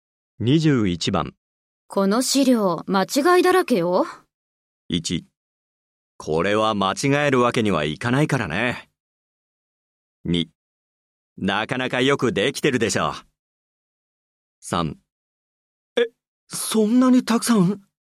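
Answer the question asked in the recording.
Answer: 3: え、そんなにたくさん?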